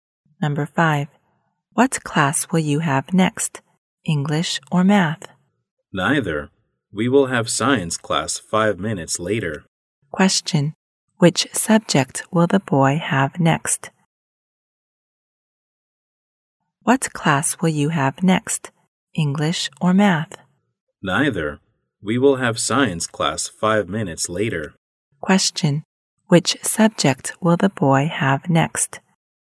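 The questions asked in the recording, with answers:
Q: Question, which subject will the boy have next?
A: Science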